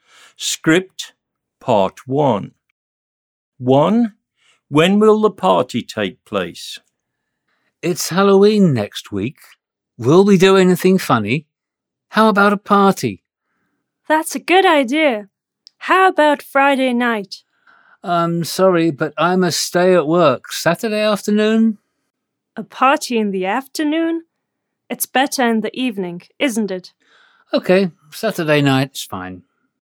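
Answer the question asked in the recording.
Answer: Saturday night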